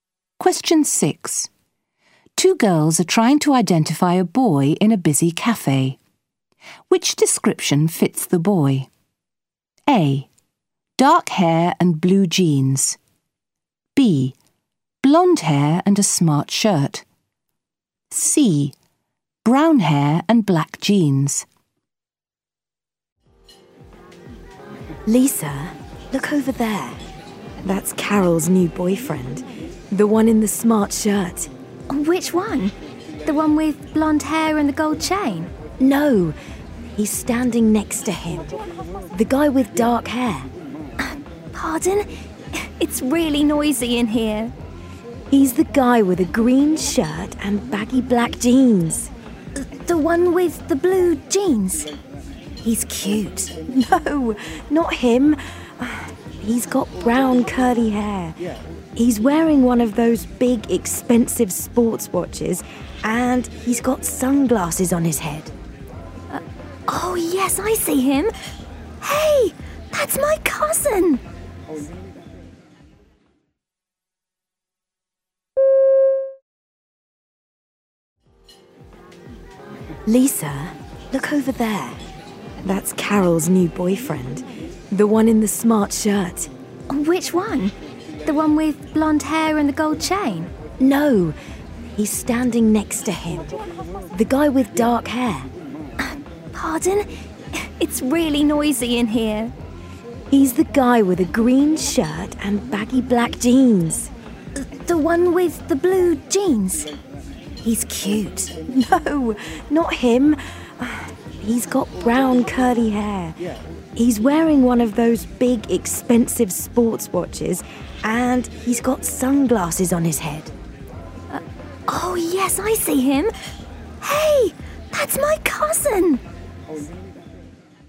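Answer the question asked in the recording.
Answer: C: Brown hair and black jeans.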